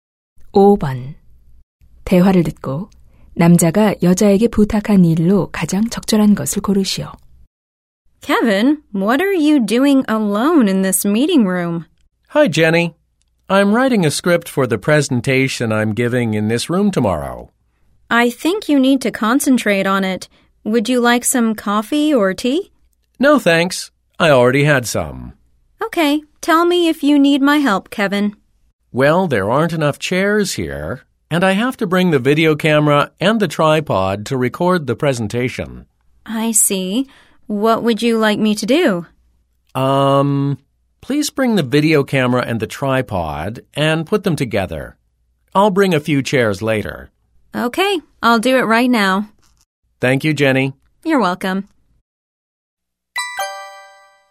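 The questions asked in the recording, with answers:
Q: 대화를 듣고 남자가 여자에게 부탁한 일로 가장 적절한 것을 고르시오.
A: 비디오카메라와 삼각대를 가져와 설치하기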